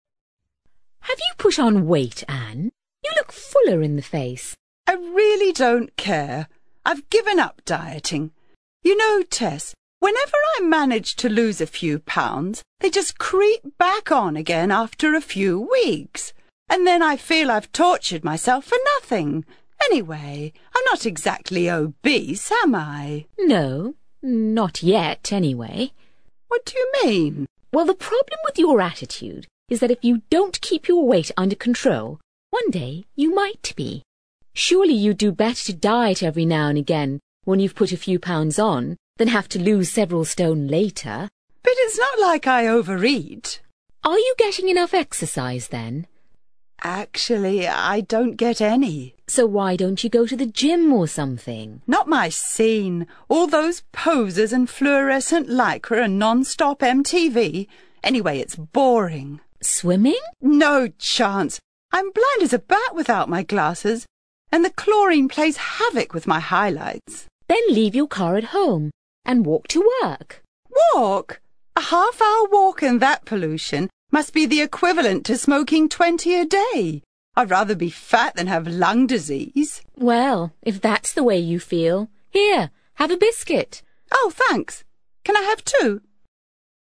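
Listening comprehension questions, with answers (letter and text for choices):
You are going to hear two friends having a conversation about slimming. For questions 5-6, choose the answer (A, B or C) which fits best according to what you hear.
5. Ann feels that dieting...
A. has done her no good.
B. is only necessary if you're obese.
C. has caused her to gain even more weight.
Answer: A. has done her no good.

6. Tess feels that Ann should...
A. make sure she doesn't gain any weight at all.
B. maintain her weight at a comfortable level.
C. diet slowly.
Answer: B. maintain her weight at a comfortable level.

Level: CPE Proficiency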